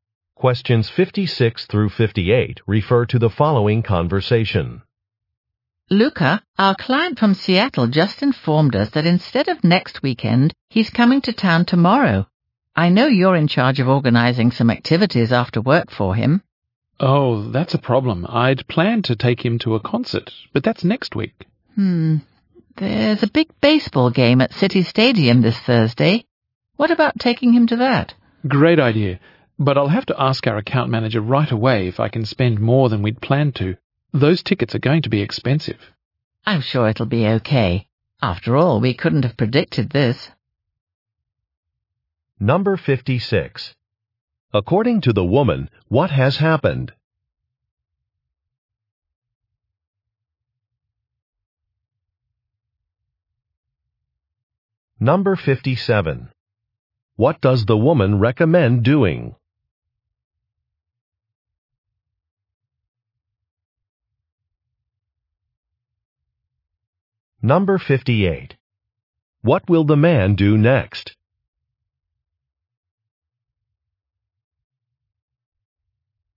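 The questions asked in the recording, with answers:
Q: According to the woman, what has happened?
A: A client's visit was moved earlier, to tomorrow

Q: What does the woman recommend doing?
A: Taking the client to a baseball game

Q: What will the man do next?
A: Ask the account manager about spending more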